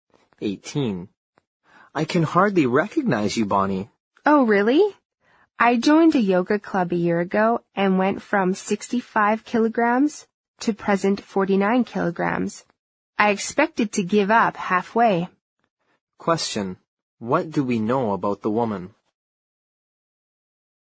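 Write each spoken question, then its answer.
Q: What do we know about the woman?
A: She lost 16 kilograms by doing yoga.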